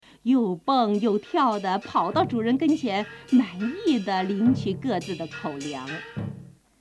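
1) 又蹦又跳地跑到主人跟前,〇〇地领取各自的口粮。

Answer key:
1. 满意 mǎnyì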